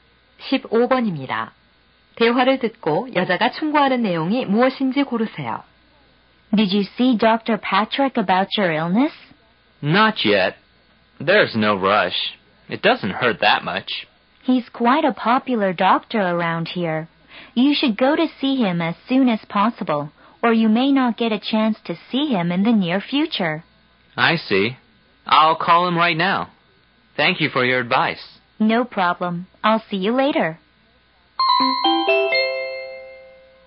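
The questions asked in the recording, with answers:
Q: 대화를 듣고 여자가 충고하는 내용이 무엇인지 고르세요.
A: 가능한 한 빨리 병원에 가서 진찰을 받아라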